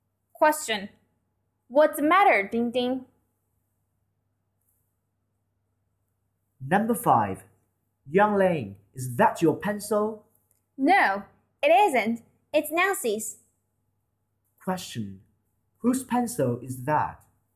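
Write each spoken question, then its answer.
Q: Whose pencil is that?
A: Nancy's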